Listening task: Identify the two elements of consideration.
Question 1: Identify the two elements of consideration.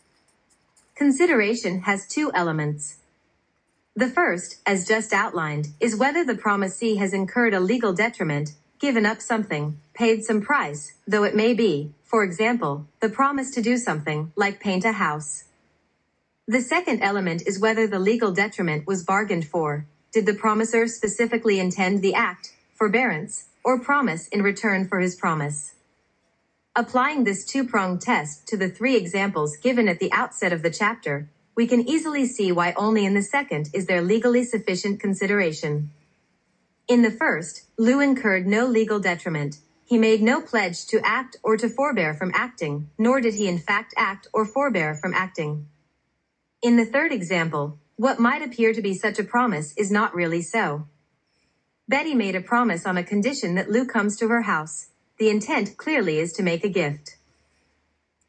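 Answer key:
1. Whether the promisee incurred a legal detriment, and whether that legal detriment was bargained for

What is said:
The first, as just outlined, is whether the promisee has incurred a legal detriment—given up something, paid some "price," though it may be, for example, the promise to do something, like paint a house.
The second element is whether the legal detriment was bargained for: did the promisor specifically intend the act, forbearance, or promise in return for his promise?
Applying this two-pronged test to the three examples given at the outset of the chapter, we can easily see why only in the second is there legally sufficient consideration.
In the first, Lou incurred no legal detriment; he made no pledge to act or to forbear from acting, nor did he in fact act or forbear from acting.
In the third example, what might appear to be such a promise is not really so. Betty made a promise on a condition that Lou comes to her house; the intent clearly is to make a gift.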